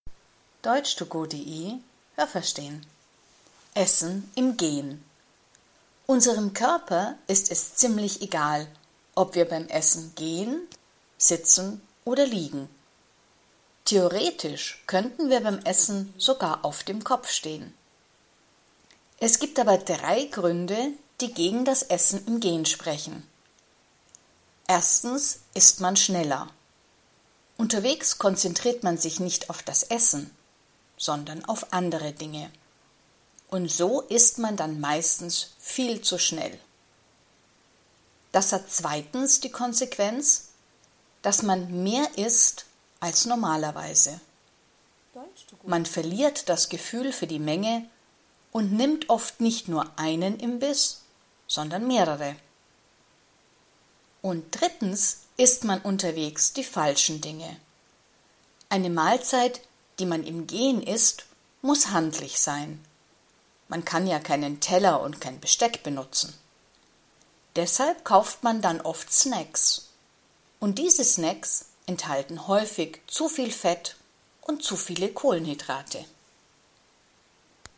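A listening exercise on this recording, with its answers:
Was haben Sie gehört? Es gibt nur eine korrekte Antwort.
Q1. Ist es dem Körper egal, ob man beim Essen geht oder sitzt?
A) ja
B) nein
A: ja

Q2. Wie viele Gründe sprechen gegen das Essen im Gehen?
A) zwei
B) drei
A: drei

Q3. Wenn man im Gehen isst, dann konzentriert man sich ...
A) nicht auf das Essen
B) auf das Essen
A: nicht auf das Essen

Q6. Wenn man unterwegs isst, dann muss das Essen ...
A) auf einem Teller liegen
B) handlich sein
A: handlich sein

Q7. Snacks, die man im Gehen isst, enthalten oft ...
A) zu viel Fett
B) zu wenige Kohlenhydrate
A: zu viel Fett

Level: A2

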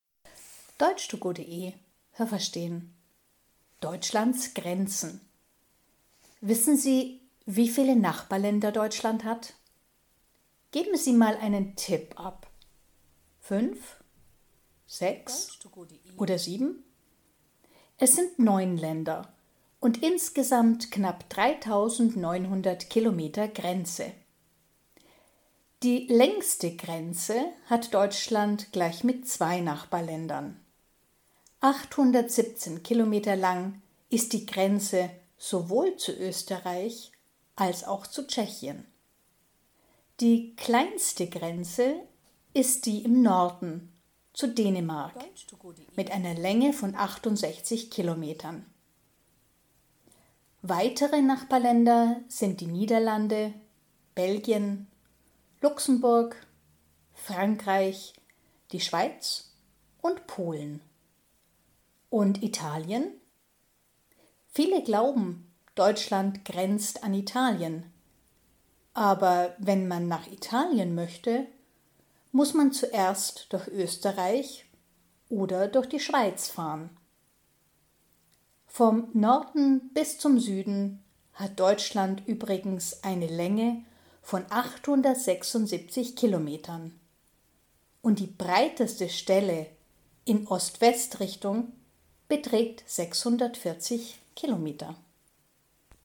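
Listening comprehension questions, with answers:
Was haben Sie gehört? Es gibt nur eine korrekte Antwort.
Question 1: Deutschland hat _____ Nachbarländer.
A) 7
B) 9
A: 9

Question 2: Deutschland hat insgesamt fast _____ Grenze.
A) 3.900 Kilometer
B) 9.300 Kilometer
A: 3.900 Kilometer

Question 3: Die deutsche Grenze zu Österreich ist ...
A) so lang wie die deutsche Grenze zu Tschechien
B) 817 Kilometer länger als die Grenze zu Tschechien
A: so lang wie die deutsche Grenze zu Tschechien

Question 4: Die Grenze zu Dänemark ist _____ Deutschlands.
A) im Norden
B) im Süden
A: im Norden

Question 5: Die Grenze zu Dänemark ist ...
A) die längste Grenze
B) die kleinste Grenze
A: die kleinste Grenze

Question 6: _____ sind Nachbarländer von Deutschland.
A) Belgien, die Schweiz, Luxemburg, Frankreich und Italien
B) Dänemark, Österreich, Frankreich, Tschechien und Polen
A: Dänemark, Österreich, Frankreich, Tschechien und Polen

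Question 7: Vom Süden bis zum Norden hat Deutschland eine Länge von ...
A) 640 Kilometern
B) 876 Kilometern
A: 876 Kilometern

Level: A2

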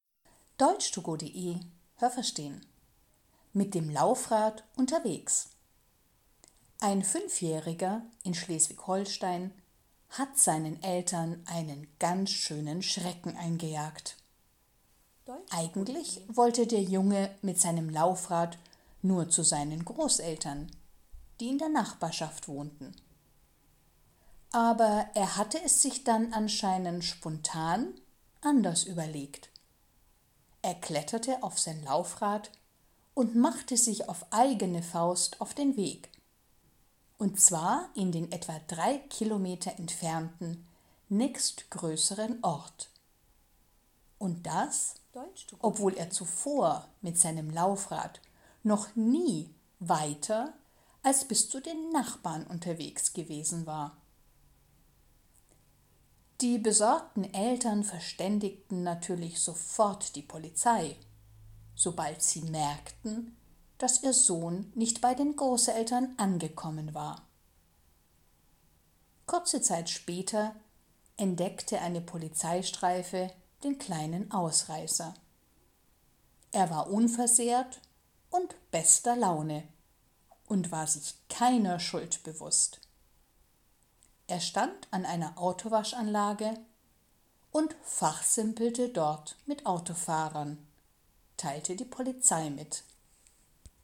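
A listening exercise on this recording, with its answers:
Was haben Sie gehört? Es gibt nur eine korrekte Antwort.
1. Der Junge war _____ Jahre alt.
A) 5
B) 15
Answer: 5

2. Der Junge wollte eigentlich mit seinem Laufrad zu seinen ...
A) Nachbarn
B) Großeltern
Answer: Großeltern

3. Er fuhr stattdessen drei Kilometer in einen anderen Ort, ...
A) weil er sich verfahren hatte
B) weil er spontan Lust darauf hatte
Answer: weil er spontan Lust darauf hatte

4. Er hatte solche Ausflüge mit seinem Laufrad ...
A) früher schon gemacht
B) noch nie unternommen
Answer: noch nie unternommen

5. _____ kontaktierten die Polizei.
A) Die Eltern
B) Die Großeltern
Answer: Die Eltern

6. Als die Polizei den Jungen fand, ...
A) war er traurig und ein bisschen verletzt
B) war er unverletzt und guter Stimmung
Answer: war er unverletzt und guter Stimmung

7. Er stand an einer Autowaschanlage und ...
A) beobachtete die Autofahrer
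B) unterhielt sich mit den Autofahrern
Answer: unterhielt sich mit den Autofahrern

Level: B1

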